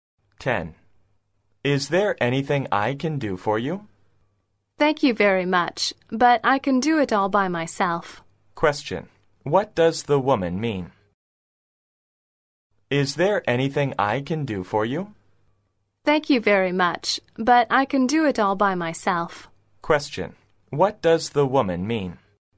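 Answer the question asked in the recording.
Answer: She doesn't need help; she can do it herself.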